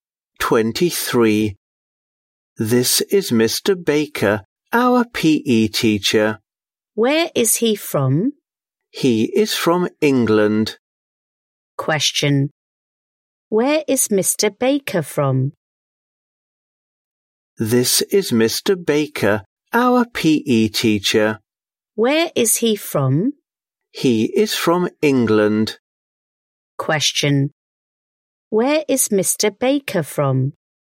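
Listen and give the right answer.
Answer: England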